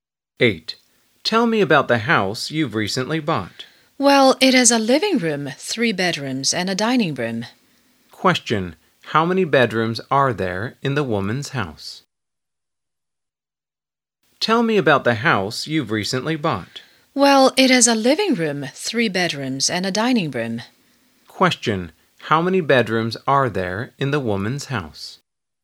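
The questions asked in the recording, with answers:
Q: How many bedrooms are there in the woman's house?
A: Three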